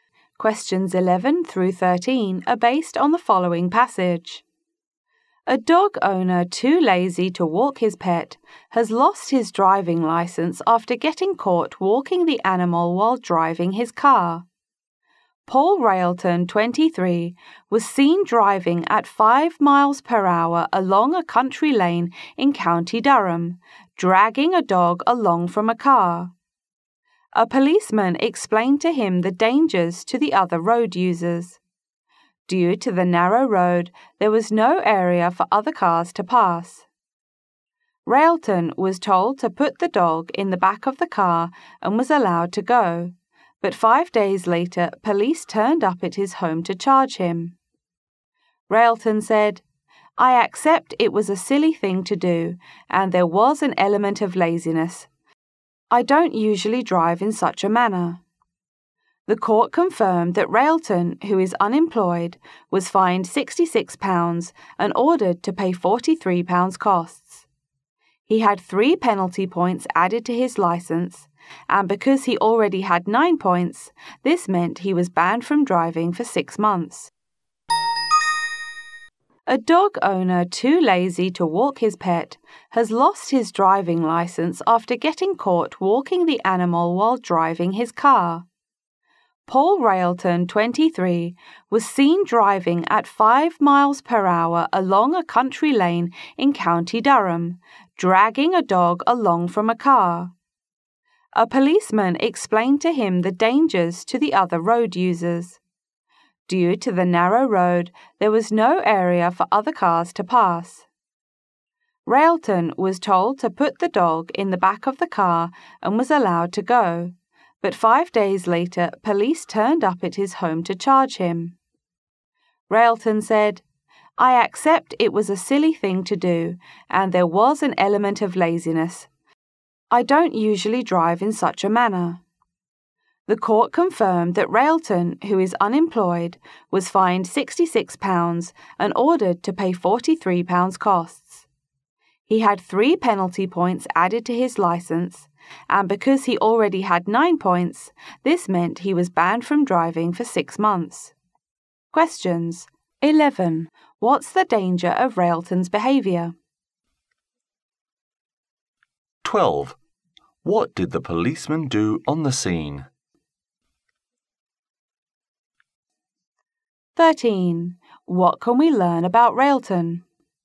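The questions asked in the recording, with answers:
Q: What's the danger of Railton's behaviour?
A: Other cars couldn't pass on the narrow road

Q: What did the policeman do on the scene?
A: Told him to put the dog in the car and let him go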